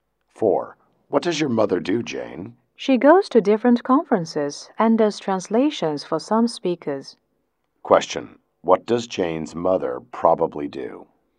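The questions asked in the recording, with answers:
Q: what does Jane's mother probably do?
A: She is an interpreter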